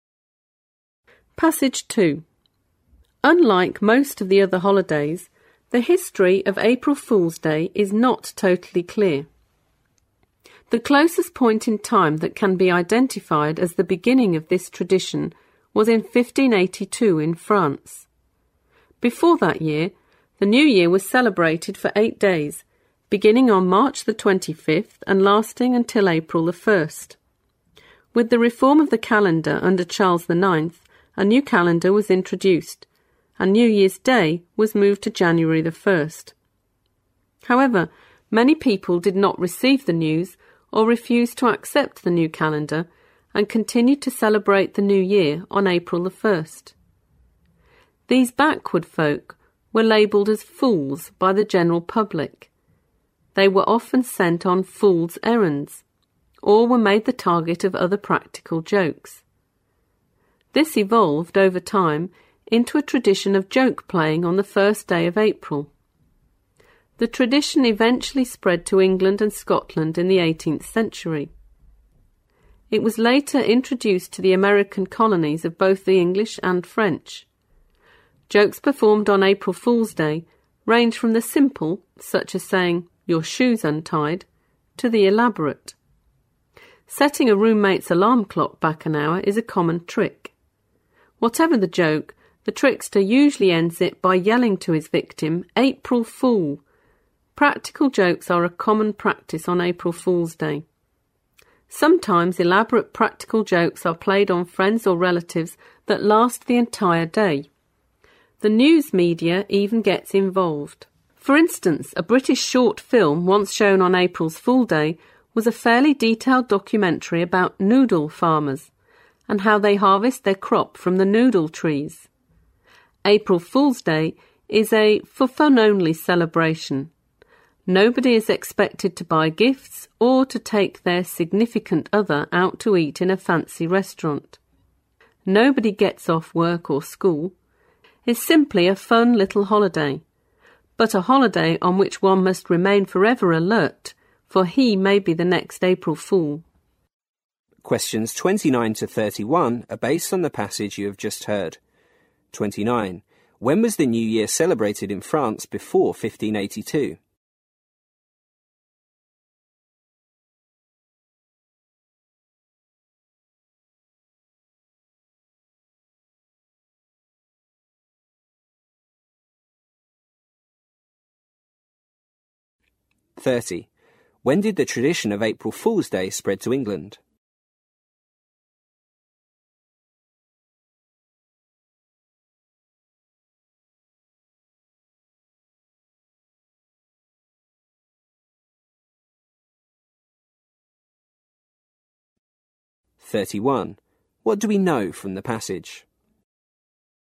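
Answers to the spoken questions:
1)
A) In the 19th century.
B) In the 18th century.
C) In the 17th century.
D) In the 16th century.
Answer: B) In the 18th century.
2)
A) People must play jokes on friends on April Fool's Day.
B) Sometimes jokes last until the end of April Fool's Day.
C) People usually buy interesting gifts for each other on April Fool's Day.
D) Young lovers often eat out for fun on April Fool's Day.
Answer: B) Sometimes jokes last until the end of April Fool's Day.
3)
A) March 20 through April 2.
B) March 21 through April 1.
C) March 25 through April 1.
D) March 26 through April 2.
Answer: C) March 25 through April 1.

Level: 四级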